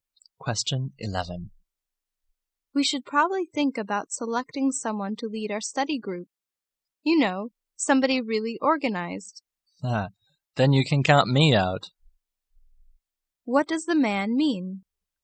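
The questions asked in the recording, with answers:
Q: What does the man mean?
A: He isn't the organized person they need to lead the group.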